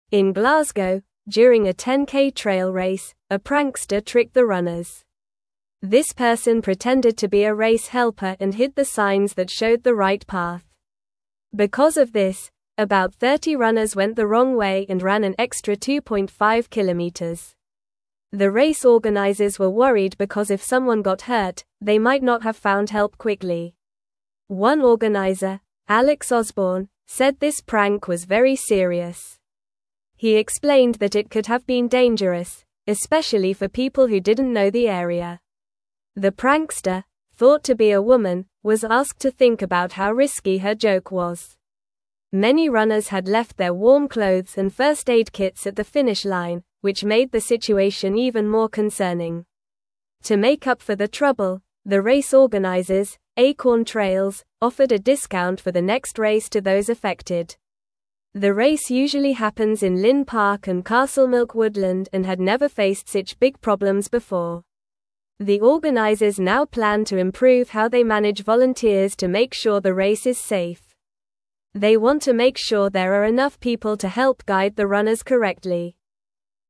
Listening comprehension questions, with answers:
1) In Glasgow, during a 10k (1)______ race, a (2)______ tricked the runners.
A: trail

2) In Glasgow, during a 10k (1)______ race, a (2)______ tricked the runners.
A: prankster

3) This person pretended to be a race (3)______ and hid the signs that showed the right path.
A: helper

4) The race organisers were worried because if someone got hurt, they might not have (4)______ help quickly.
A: found

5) One (5)______, (6)______ Osborne, said this prank was very serious.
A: organiser

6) One (5)______, (6)______ Osborne, said this prank was very serious.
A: Alex

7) Many runners had left their warm (7)______ and first aid kits at the finish line, which made the situation even more (8)______.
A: clothes

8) Many runners had left their warm (7)______ and first aid kits at the finish line, which made the situation even more (8)______.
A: concerning

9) To make up for the trouble, the race organisers, (9)______ Trails, offered a discount for the next race to those affected.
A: Acorn

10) The race usually happens in Linn Park and (10)______ Woodland and had never faced (11)______ big problems before.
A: Castlemilk

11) The race usually happens in Linn Park and (10)______ Woodland and had never faced (11)______ big problems before.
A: such

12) They want to make sure there are enough people to help guide the (12)______ correctly.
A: runners

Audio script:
In Glasgow, during a 10k trail race, a prankster tricked the runners. This person pretended to be a race helper and hid the signs that showed the right path. Because of this, about 30 runners went the wrong way and ran an extra 2.5 kilometers. The race organisers were worried because if someone got hurt, they might not have found help quickly.
One organiser, Alex Osborne, said this prank was very serious. He explained that it could have been dangerous, especially for people who didn't know the area. The prankster, thought to be a woman, was asked to think about how risky her joke was. Many runners had left their warm clothes and first aid kits at the finish line, which made the situation even more concerning.
To make up for the trouble, the race organisers, Acorn Trails, offered a discount for the next race to those affected. The race usually happens in Linn Park and Castlemilk Woodland and had never faced such big problems before. The organisers now plan to improve how they manage volunteers to make sure the race is safe. They want to make sure there are enough people to help guide the runners correctly.

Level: Level 2